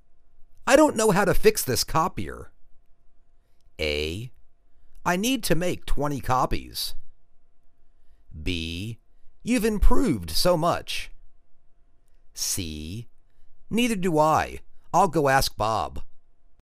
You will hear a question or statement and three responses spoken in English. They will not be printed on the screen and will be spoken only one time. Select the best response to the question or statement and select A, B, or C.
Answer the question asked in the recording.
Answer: Neither do I. I'll go ask Bob.